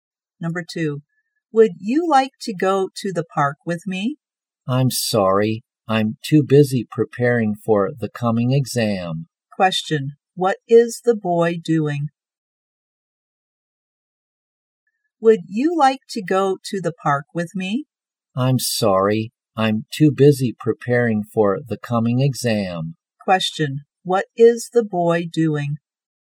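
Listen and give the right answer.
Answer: preparing for the coming exam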